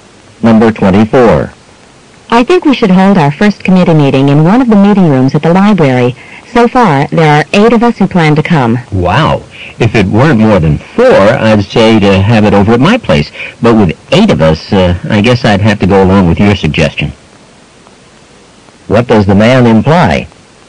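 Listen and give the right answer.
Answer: His place is too small, so they should meet at the library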